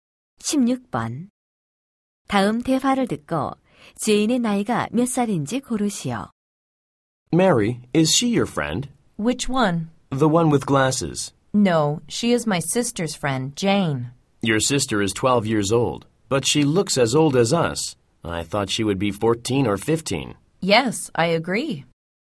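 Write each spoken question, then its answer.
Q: 다음 대화를 듣고 제인의 나이가 몇 살인지 고르시오.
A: 12살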